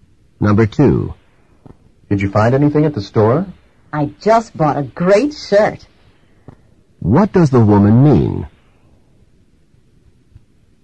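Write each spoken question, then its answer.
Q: What does the woman mean?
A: She bought a shirt.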